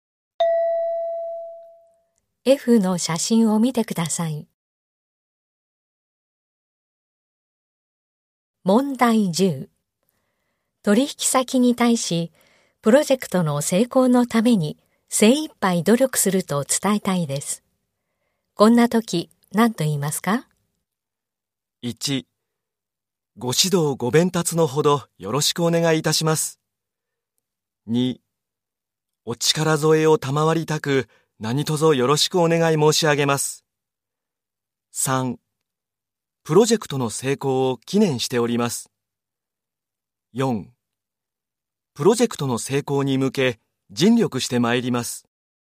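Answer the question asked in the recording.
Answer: 4: プロジェクトの成功に向け尽力してまいります。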